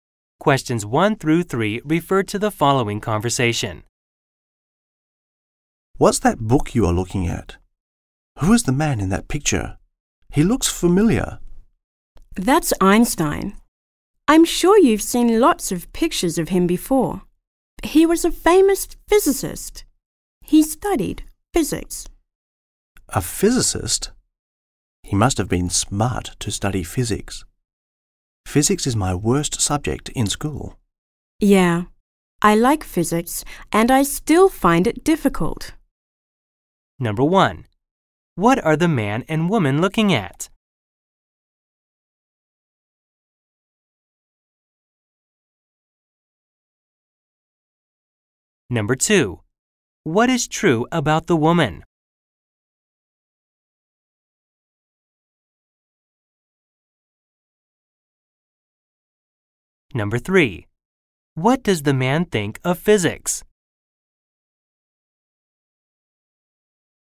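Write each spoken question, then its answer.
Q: What are the man and woman looking at?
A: A book with a picture of Einstein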